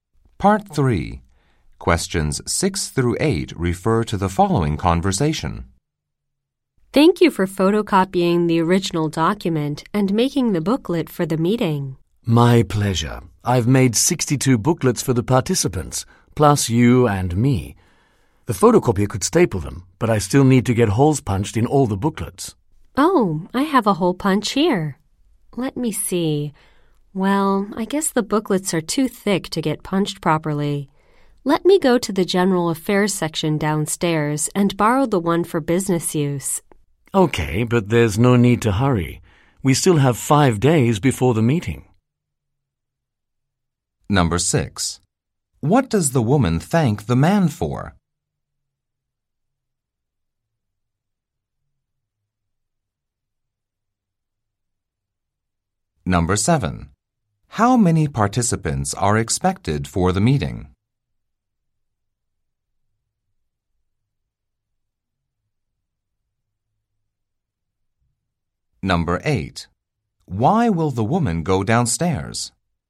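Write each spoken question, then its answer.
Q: What does the woman thank the man for?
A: Photocopying the original document and making the booklet for the meeting

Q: How many participants are expected for the meeting?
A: 62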